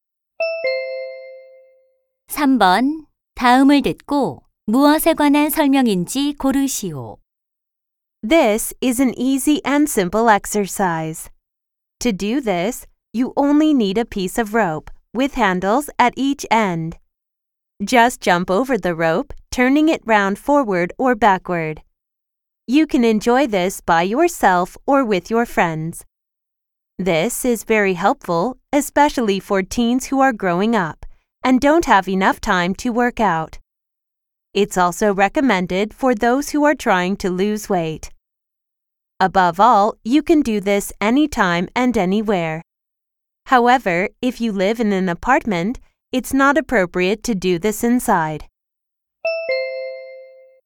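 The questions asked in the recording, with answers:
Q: 다음을 듣고 무엇에 관한 설명인지 고르시오.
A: 줄넘기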